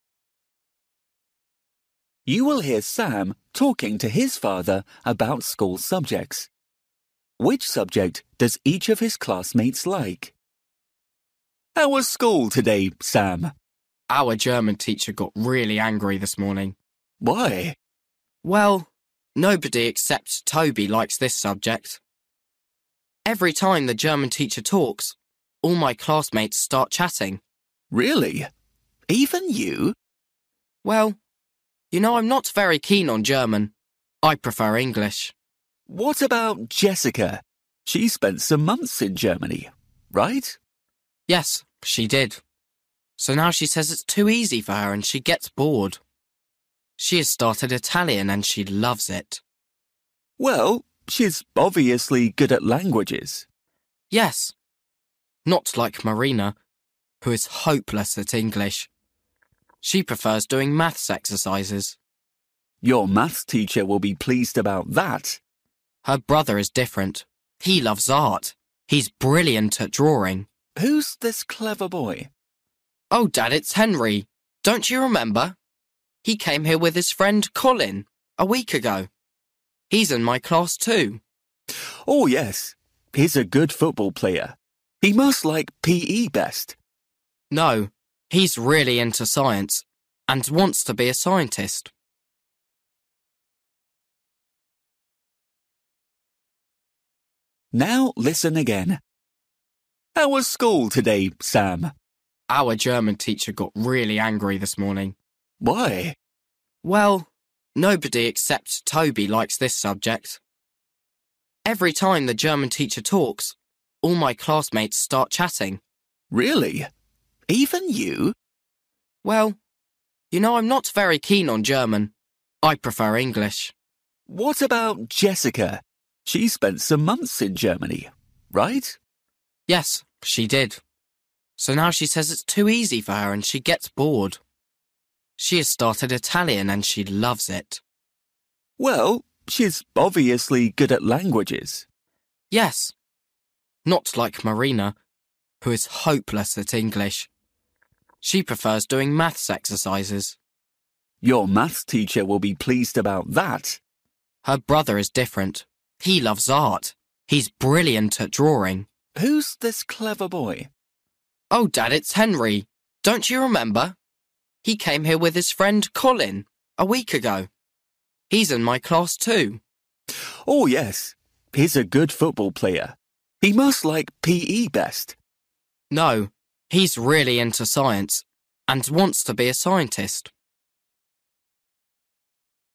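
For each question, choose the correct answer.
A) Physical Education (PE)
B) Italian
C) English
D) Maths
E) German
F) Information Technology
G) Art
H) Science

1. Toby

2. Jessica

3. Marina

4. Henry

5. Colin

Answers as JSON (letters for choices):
{"1": "E", "2": "B", "3": "D", "4": "G", "5": "H"}

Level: Luyện nghe trình độ A2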